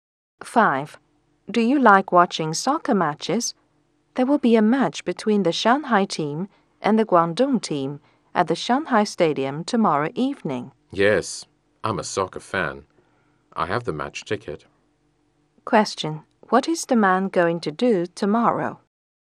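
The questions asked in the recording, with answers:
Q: What is the man going to do tomorrow?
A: Watch a soccer match at the Shanghai Stadium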